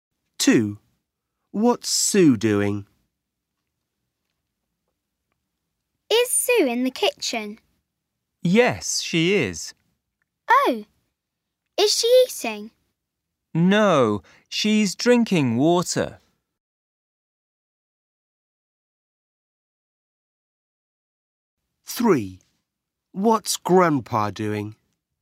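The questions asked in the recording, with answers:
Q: What's Sue doing?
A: drinking water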